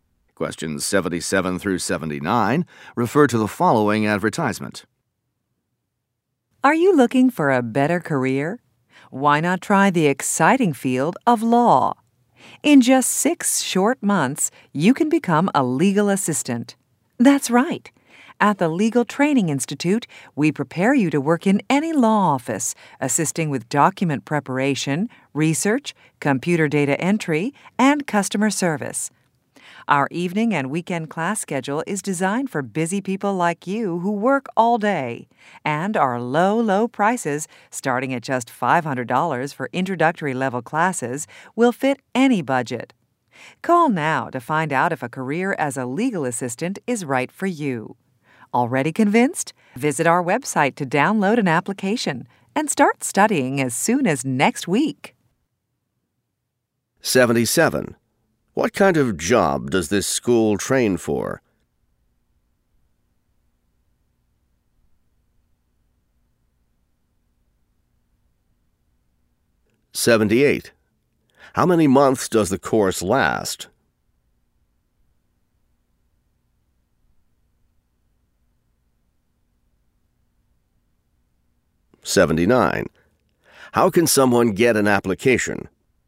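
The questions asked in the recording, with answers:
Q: What kind of job does this school train for?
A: Legal assistant

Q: How many months does the course last?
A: 6 months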